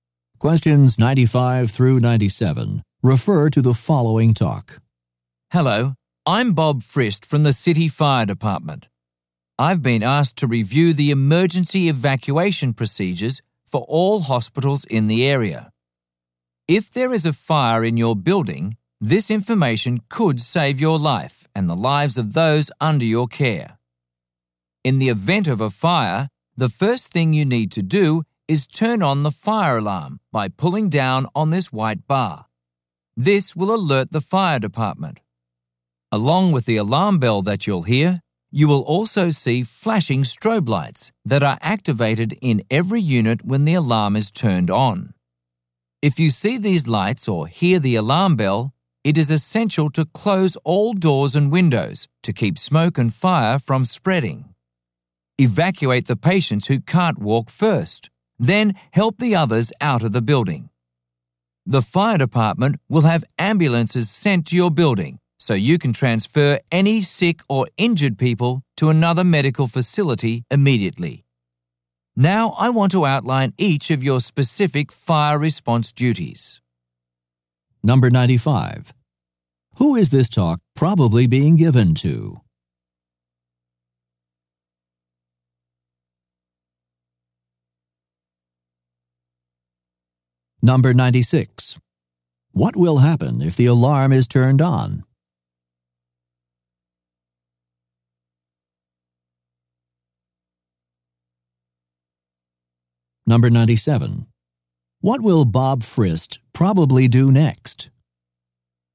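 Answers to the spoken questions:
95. Hospital staff
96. The fire department is alerted and strobe lights flash
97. Outline each person's specific fire response duties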